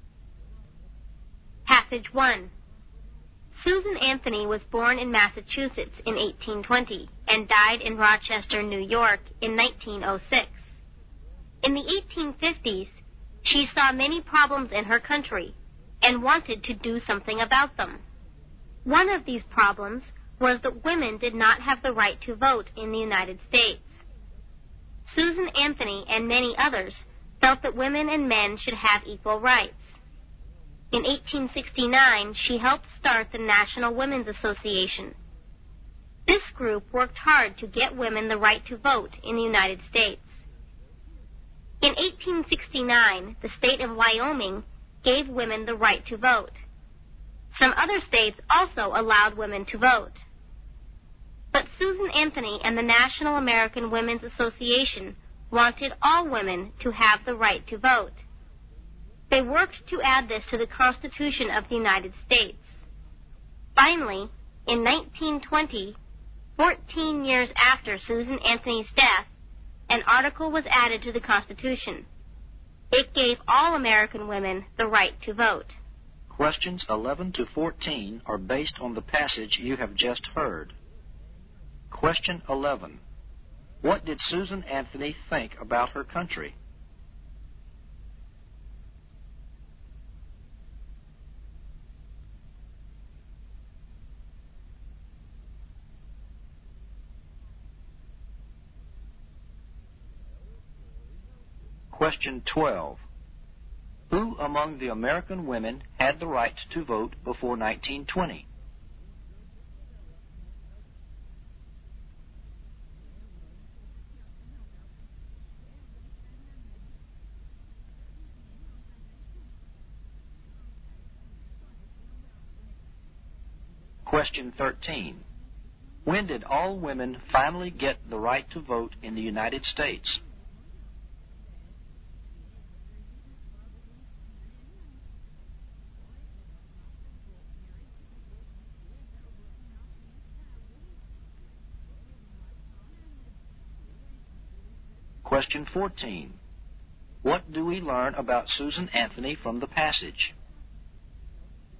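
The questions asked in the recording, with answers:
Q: What did Susan Anthony think about her country?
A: It had many problems

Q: Who among the American women had the right to vote before 1920?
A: Women in Wyoming and some other states

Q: When did all women finally get the right to vote in the United States?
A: In 1920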